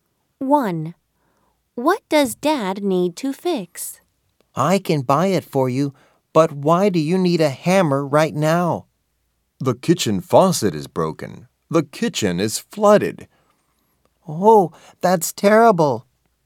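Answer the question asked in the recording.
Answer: The kitchen faucet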